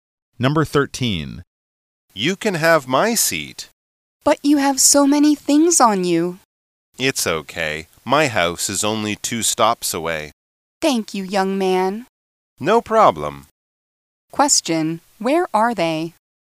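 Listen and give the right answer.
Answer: On a bus.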